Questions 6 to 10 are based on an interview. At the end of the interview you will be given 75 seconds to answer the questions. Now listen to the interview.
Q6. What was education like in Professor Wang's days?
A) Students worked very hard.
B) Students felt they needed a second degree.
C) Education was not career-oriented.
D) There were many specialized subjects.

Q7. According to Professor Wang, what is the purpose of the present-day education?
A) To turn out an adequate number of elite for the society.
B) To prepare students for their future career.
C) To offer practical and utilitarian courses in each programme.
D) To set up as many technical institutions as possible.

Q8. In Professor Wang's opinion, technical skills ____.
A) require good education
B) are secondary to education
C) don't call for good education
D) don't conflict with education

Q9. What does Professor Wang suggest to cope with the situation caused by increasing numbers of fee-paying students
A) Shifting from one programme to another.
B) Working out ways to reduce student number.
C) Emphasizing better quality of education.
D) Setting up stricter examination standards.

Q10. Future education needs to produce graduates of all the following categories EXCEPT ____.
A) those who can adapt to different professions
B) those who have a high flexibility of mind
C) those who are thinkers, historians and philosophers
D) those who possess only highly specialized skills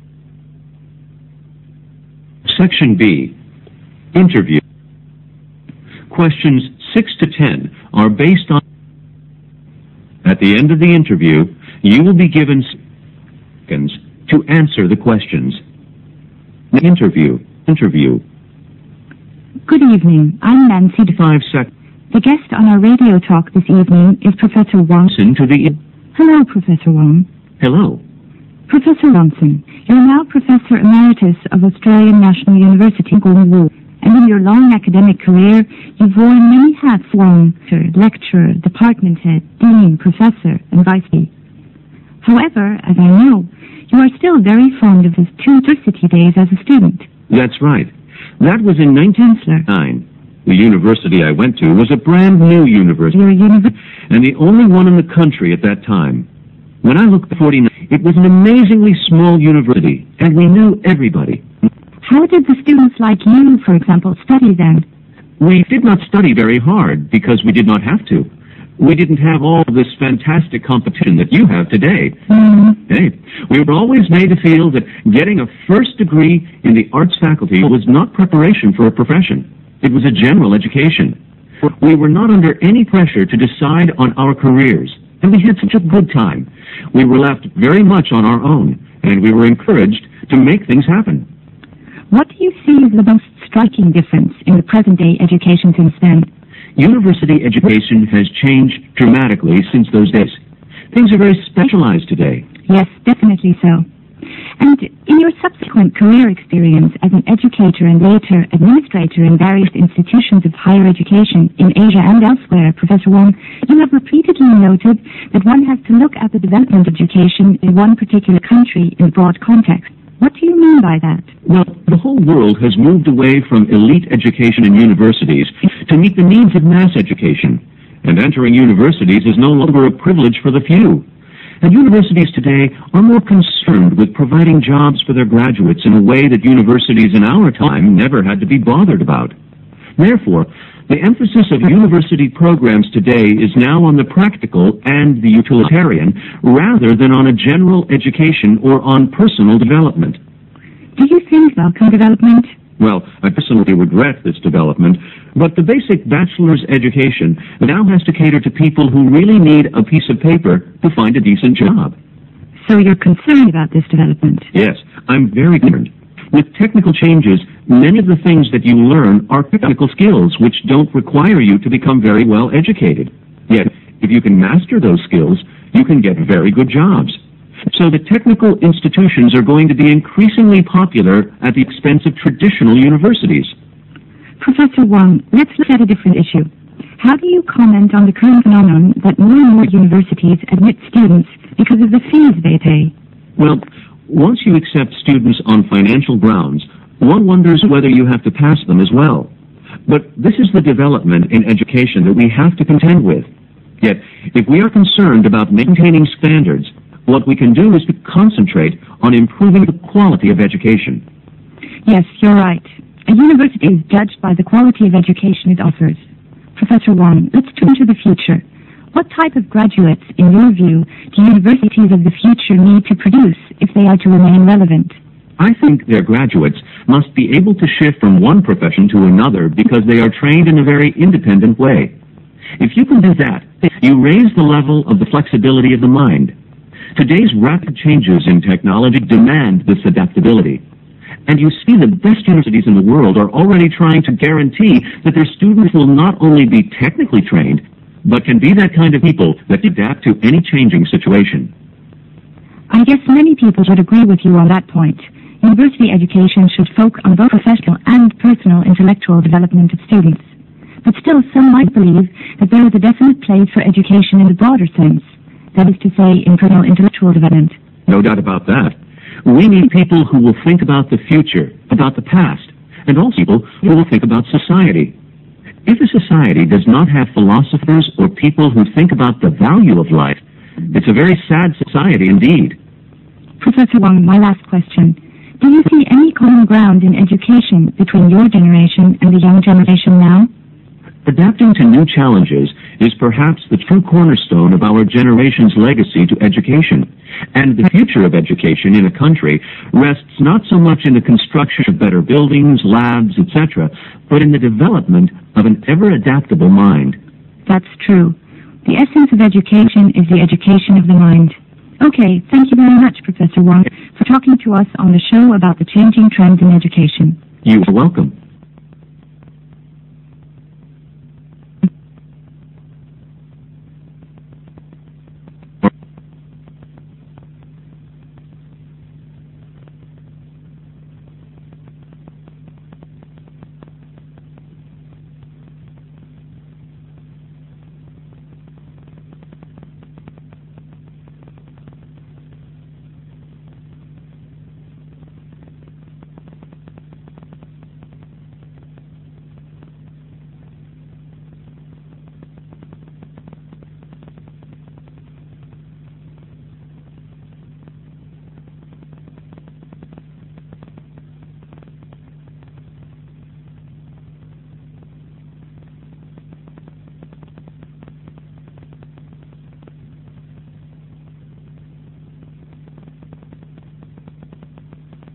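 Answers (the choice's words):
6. Education was not career-oriented.
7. To prepare students for their future career.
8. don't call for good education
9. Emphasizing better quality of education.
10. those who possess only highly specialized skills

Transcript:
W: Good evening, I'm Nancy Johnson. The guest on our radio talk this evening is Professor Wang Gongwu. Hello, Professor Wang.
M: Hello.
W: Professor Wang, you're now professor emeritus of Australia National University, and in your long academic career, you've worn many hats as tutor, lecturer, department head, dean, professor, and vice chancellor. However, as I know, you're still very fond of your university days as a student.
M: That's right. That was in 1949. The university that I went to was a brandnew university then, and the only one in the country at that time. When I look back, it was an amazingly small university, and we knew everybody.
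W: How did the students like you, for example, study then?
M: We didn't study very hard, because we didn't have to. We didn't have all this fantastic competition that you have today. We were always made to feel that getting a first degree in the Arts faculty was not preparation for a profession. It was a general education. We were not under any pressure to decide on our careers, and we had such a good time. We were left very much on our own, and we were encouraged to make things happen.
W: What do you see as the most striking difference in university education since then?
M: University education has changed dramatically since those days. Things are very specialized today.
W: Yes, definitely so. And, in your subsequent career experience as an educator and later administrator in various institutions of higher education in Asia and elsewhere, Professor Wang, you have repeatedly noted that one has to look at the development of education in one particular country in a broad context. 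What do you mean by that?
M: Well, the whole world has moved away from elite education in universities to meet the needs of mass education, and entering universities is no longer a privilege for the few. And universities today are more concerned with providing jobs for their graduates in a way that universities in our time never had to be bothered about. Therefore, the emphasis of university programs today is now on the practical and the utilitarian, rather than on a general education or on personal development.
W: Do you think that is a welcome development?
M: Well, I personally regret this development. But the basic bachelor's education now has to cater to people who really need a piece of paper to find a decent job.
W: So you're concerned about this development.
M: Yes, I'm very concerned. With technical changes, many of the things that you learn are technical skills, which don't require you to become very well educated. 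Yet, if you can master those skills, you can get very good jobs. So the technical institutions are going to be increasingly popular at the expense of traditional universitites.
W: Professor Wang, let's look at a different issue. How do you comment on the current phenomenon because of the fees they pay?
M: Well, once you accept students on financial grounds, one wonders whether you have to pass them as well. But this is the development in education that we have to contend with. Yet, if we are concerned about maintaining standards, what we can do is to concentrate on improving the quality of education.
W: Yes, you're right. A university is judged by the quality of education it offers. Professor Wang, let's turn to the future. What type of graduates, in your view, to universities of the future need to produce, if they are to remain relevant?
M: I think their graduates must be able to shift from one profession to another, because they are trained in a very independent way. 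If you can do that, you raise the level of the flexibility of the mind. Today's rapid changes in technology demand this adaptability. And you see the best universities in the world are already trying to guarantee that their students will not only be technically trained, but will be the kind of people that can adapt to any changing situation.
W: I guess many people would agree with you on that point. University education should focus on both personal and professional development of students. But still some might believe there is a definite place for education in a broader sense - that is, in personal intellectual development.
M: No doubt about that. We need people who will think about the future, about the past, and also people who will think about society. If a society doesn't have philosophers, or people who think about the value of life, it's a very sad society indeed.
W: Professor Wang, my last question: do you see any common ground in education between your generation and the young generation now?
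M: Adapting to new challenges is perhaps the true cornerstone of our generation's legacy to education. And the future of education in a country rests not so much on the construction of better buildings, labs, etc., but in the development of an everadaptable mind.
W: That's true. The essence of education is the education of the mind. Okay, thank you very much, Professor Wang, for talking to us on the show about the changing trends in education.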